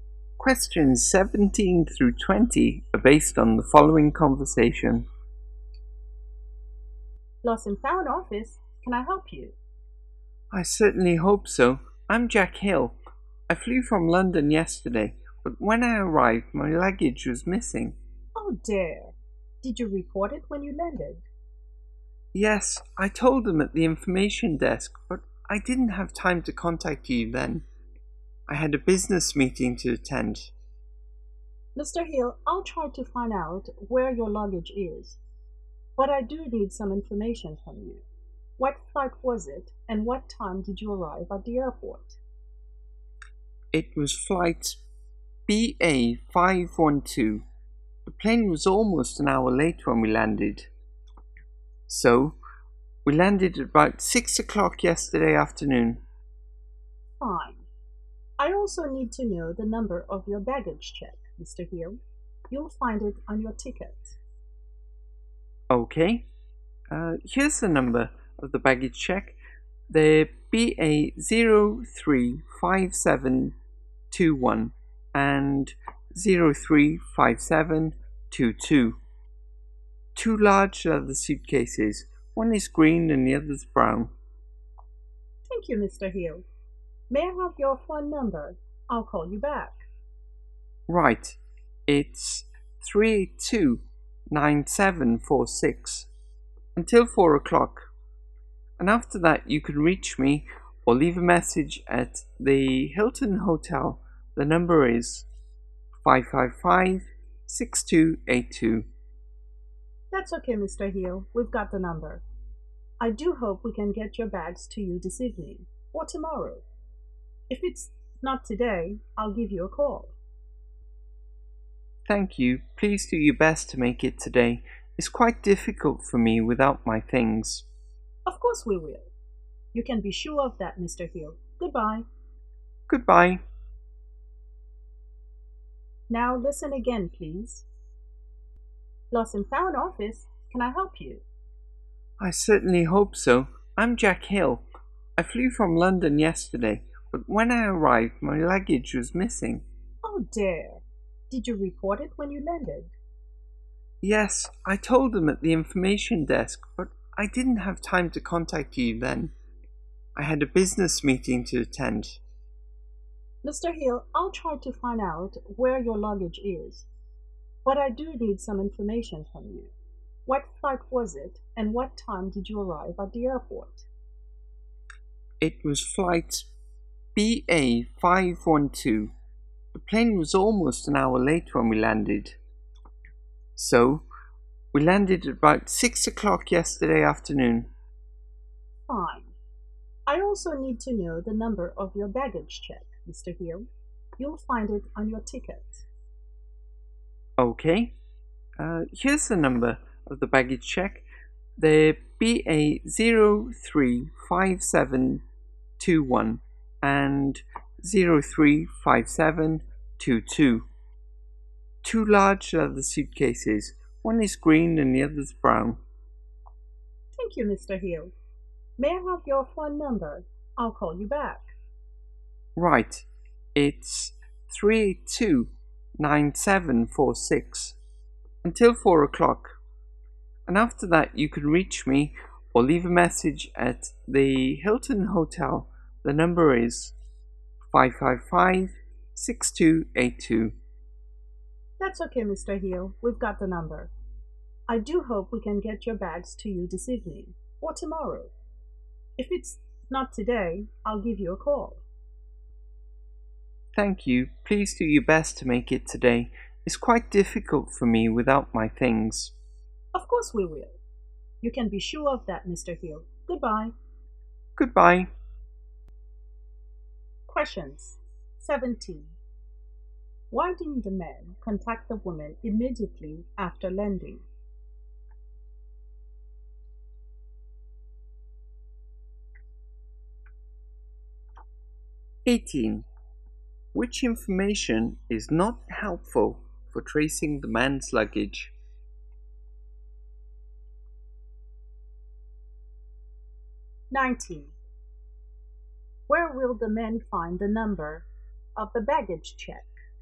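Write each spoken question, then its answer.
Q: Why didn't the men contact the woman immediately after landing?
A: He had a business meeting to attend

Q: Where will the men find the number of the baggage check?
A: On his ticket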